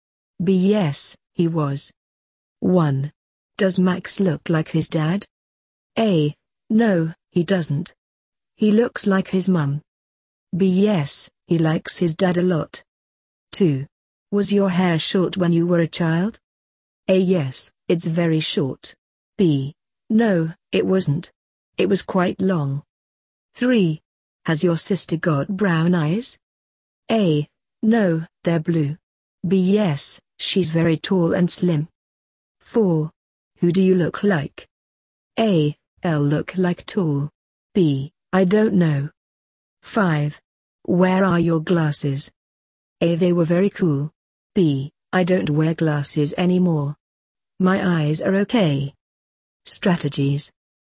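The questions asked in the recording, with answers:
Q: Does Max look like his dad?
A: A: No, he doesn't. He looks like his mum.

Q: Was your hair short when you were a child?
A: B: No, it wasn't. It was quite long.

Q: Has your sister got brown eyes?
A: A: No, they're blue.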